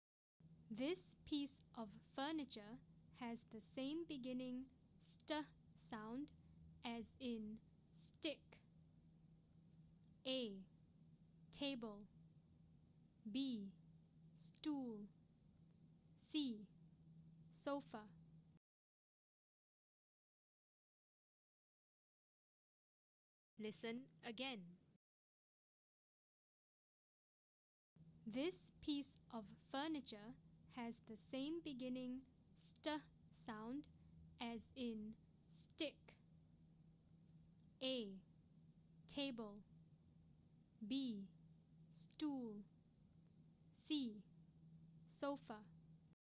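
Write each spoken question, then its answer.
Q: This piece of furniture has the same beginning st sound as in stick.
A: B: Stool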